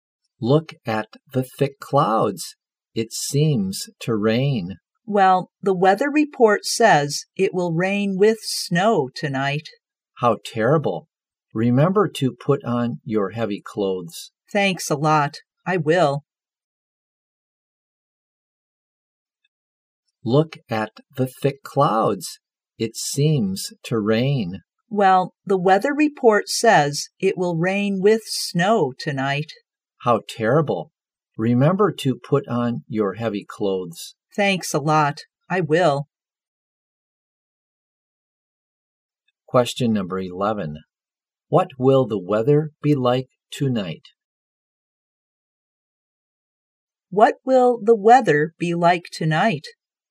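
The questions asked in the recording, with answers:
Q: What will the weather be like tonight?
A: Rainy with snow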